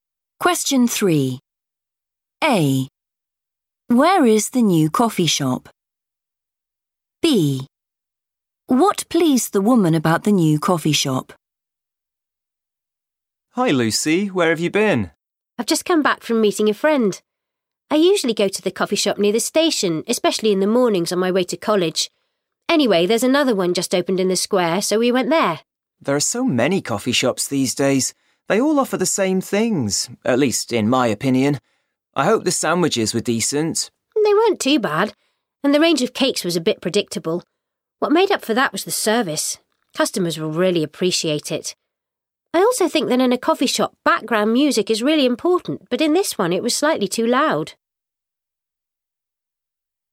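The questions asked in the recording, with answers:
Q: Where is the new coffee shop?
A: in the square

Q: What pleased the woman about the new coffee shop?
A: the service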